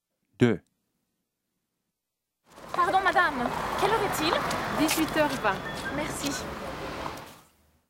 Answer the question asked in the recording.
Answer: number 2, 1820